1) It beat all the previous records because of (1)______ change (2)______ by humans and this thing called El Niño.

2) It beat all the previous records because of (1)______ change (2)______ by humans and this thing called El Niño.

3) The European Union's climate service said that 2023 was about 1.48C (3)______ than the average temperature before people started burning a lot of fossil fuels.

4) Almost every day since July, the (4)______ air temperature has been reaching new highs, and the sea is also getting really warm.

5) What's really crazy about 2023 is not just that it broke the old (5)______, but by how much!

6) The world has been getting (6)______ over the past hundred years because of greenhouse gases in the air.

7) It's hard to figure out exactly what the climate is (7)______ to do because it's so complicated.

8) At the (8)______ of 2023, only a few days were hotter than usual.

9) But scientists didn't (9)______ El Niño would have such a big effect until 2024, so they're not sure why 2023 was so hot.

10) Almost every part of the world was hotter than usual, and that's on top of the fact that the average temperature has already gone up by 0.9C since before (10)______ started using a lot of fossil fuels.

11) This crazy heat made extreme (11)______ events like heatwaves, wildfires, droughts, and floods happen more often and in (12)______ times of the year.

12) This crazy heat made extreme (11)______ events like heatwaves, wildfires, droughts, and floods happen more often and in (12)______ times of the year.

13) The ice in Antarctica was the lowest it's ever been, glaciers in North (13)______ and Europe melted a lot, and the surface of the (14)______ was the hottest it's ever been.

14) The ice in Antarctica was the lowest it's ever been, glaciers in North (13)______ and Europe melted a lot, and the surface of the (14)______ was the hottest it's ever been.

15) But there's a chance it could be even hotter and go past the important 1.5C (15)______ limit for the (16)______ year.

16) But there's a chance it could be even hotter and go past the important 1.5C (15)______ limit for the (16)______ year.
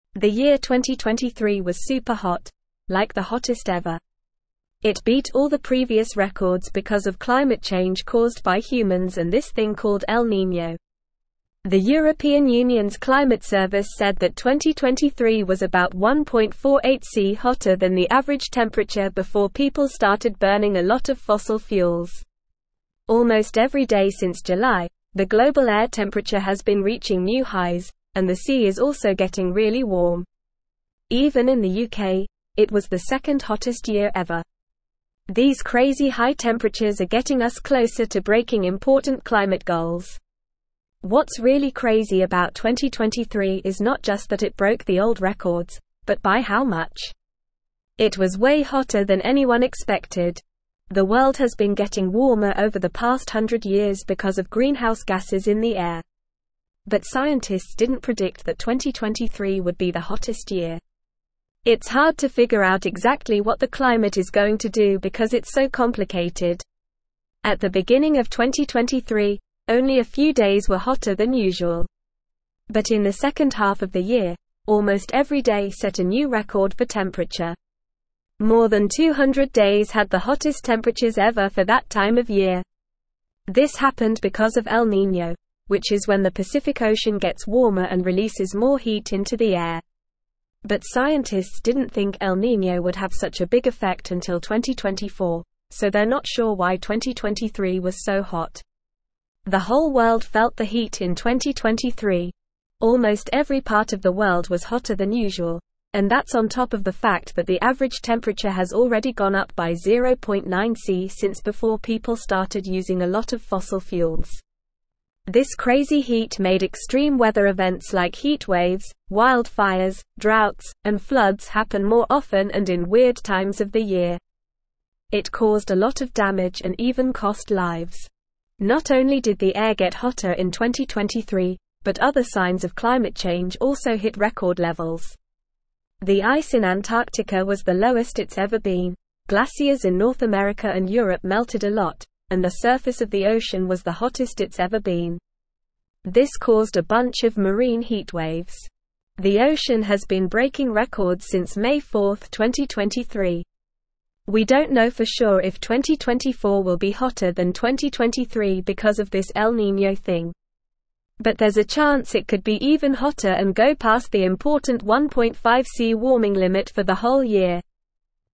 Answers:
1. climate
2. caused
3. hotter
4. global
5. records
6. warmer
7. going
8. beginning
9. think
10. people
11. weather
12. weird
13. America
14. ocean
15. warming
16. whole

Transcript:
The year 2023 was super hot, like the hottest ever! It beat all the previous records because of climate change caused by humans and this thing called El Niño. The European Union's climate service said that 2023 was about 1.48C hotter than the average temperature before people started burning a lot of fossil fuels. Almost every day since July, the global air temperature has been reaching new highs, and the sea is also getting really warm. Even in the UK, it was the second hottest year ever. These crazy high temperatures are getting us closer to breaking important climate goals.
What's really crazy about 2023 is not just that it broke the old records, but by how much! It was way hotter than anyone expected. The world has been getting warmer over the past hundred years because of greenhouse gases in the air. But scientists didn't predict that 2023 would be the hottest year. It's hard to figure out exactly what the climate is going to do because it's so complicated.
At the beginning of 2023, only a few days were hotter than usual. But in the second half of the year, almost every day set a new record for temperature. More than 200 days had the hottest temperatures ever for that time of year. This happened because of El Niño, which is when the Pacific Ocean gets warmer and releases more heat into the air. But scientists didn't think El Niño would have such a big effect until 2024, so they're not sure why 2023 was so hot.
The whole world felt the heat in 2023. Almost every part of the world was hotter than usual, and that's on top of the fact that the average temperature has already gone up by 0.9C since before people started using a lot of fossil fuels. This crazy heat made extreme weather events like heatwaves, wildfires, droughts, and floods happen more often and in weird times of the year. It caused a lot of damage and even cost lives.
Not only did the air get hotter in 2023, but other signs of climate change also hit record levels. The ice in Antarctica was the lowest it's ever been, glaciers in North America and Europe melted a lot, and the surface of the ocean was the hottest it's ever been. This caused a bunch of marine heatwaves. The ocean has been breaking records since May 4th, 2023.
We don't know for sure if 2024 will be hotter than 2023 because of this El Niño thing. But there's a chance it could be even hotter and go past the important 1.5C warming limit for the whole year.

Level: Level 3